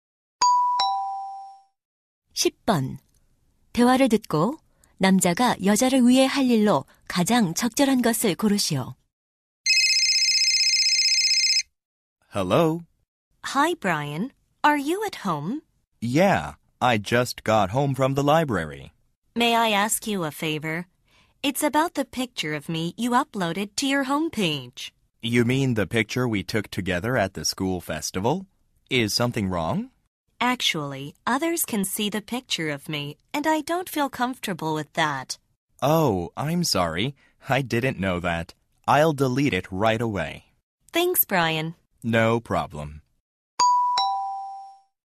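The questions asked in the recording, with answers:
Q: 대화를 듣고 남자가 여자를 위해 할 일로 가장 적절한 것을 고르시오.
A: 홈페이지에 올린 여자의 사진 삭제하기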